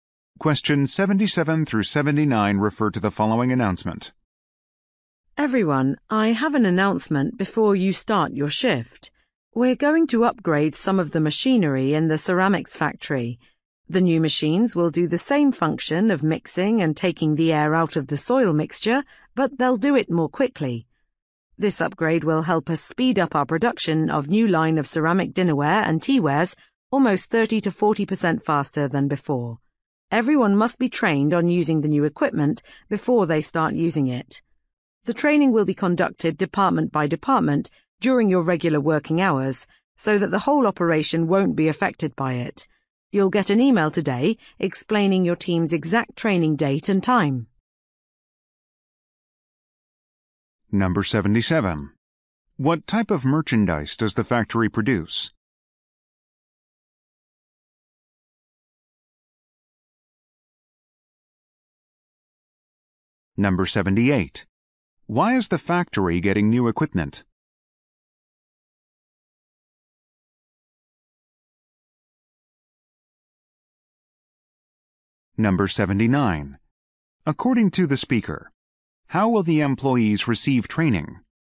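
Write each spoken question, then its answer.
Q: What type of merchandise does the factory produce?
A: Ceramic dinnerware and teaware

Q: Why is the factory getting new equipment?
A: To speed up production

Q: According to the speaker, how will the employees receive training?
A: Department by department during regular working hours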